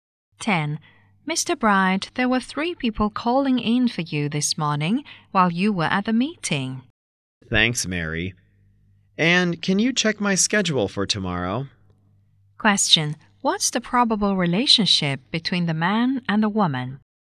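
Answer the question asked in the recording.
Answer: Boss and secretary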